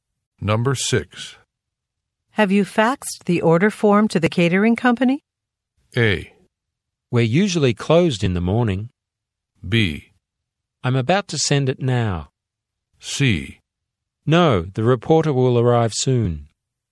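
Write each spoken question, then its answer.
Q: Have you faxed the order form to the catering company?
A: B: I'm about to send it now.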